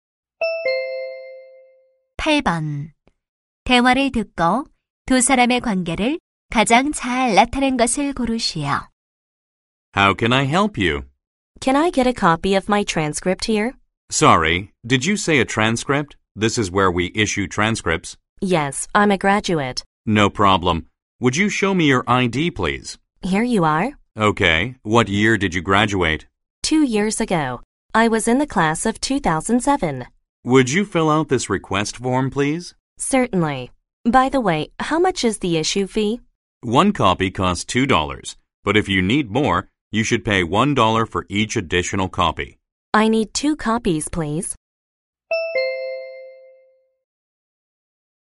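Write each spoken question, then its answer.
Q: 대화를 듣고 두 사람의 관계를 가장 잘 나타낸 것을 고르시오.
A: 학교 교무실 직원과 졸업생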